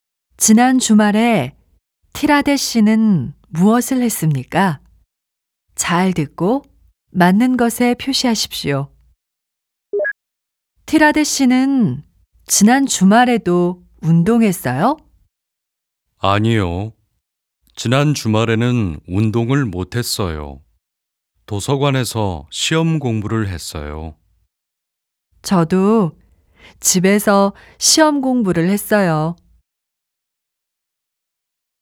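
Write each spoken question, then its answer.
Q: 지난 주말에 티라데 씨는 무엇을 했습니까?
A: 도서관에서 시험 공부를 했어요.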